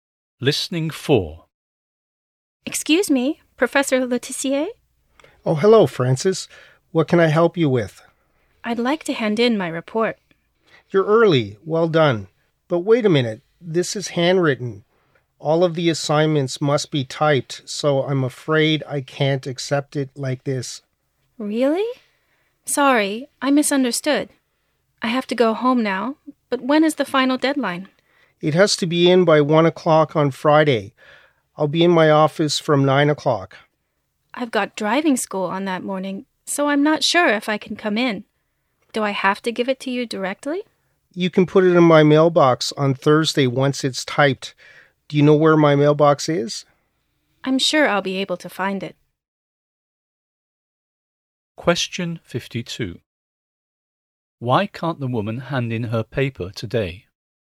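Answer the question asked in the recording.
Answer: It is handwritten, but it must be typed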